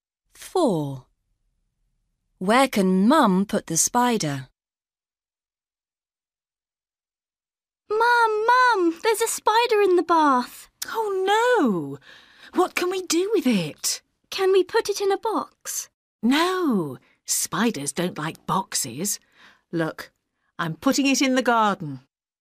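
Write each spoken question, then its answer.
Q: Where can Mum put the spider?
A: in the garden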